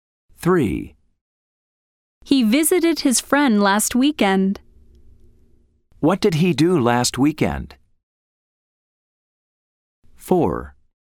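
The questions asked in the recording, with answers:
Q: What did he do last weekend?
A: He visited his friend.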